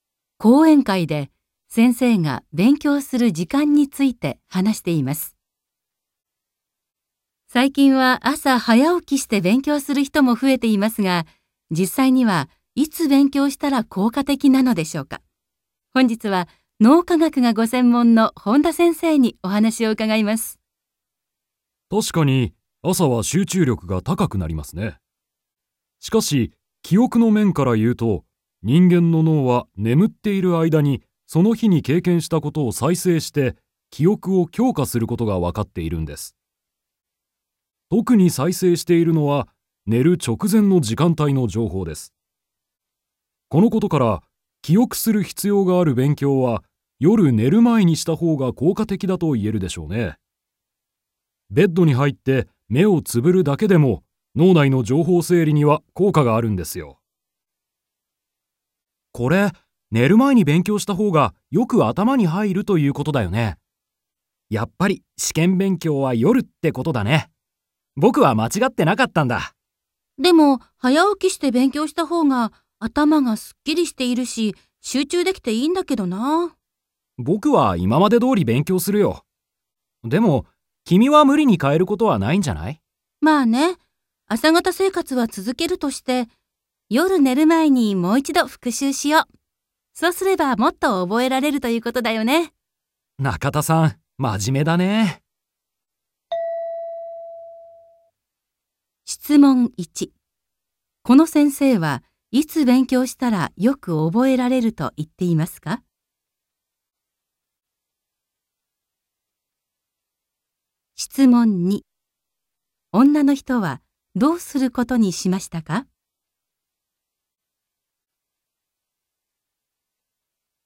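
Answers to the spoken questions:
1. 夜寝る前
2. 朝の勉強を続けて、夜寝る前にもう一度復習する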